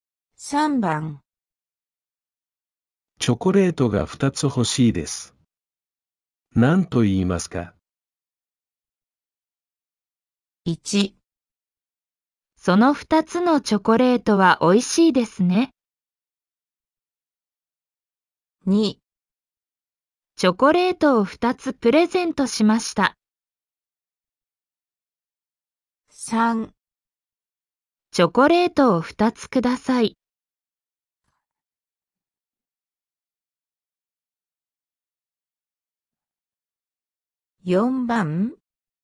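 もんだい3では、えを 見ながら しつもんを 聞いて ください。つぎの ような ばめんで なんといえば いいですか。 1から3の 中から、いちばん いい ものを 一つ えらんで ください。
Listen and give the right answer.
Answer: 3

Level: N4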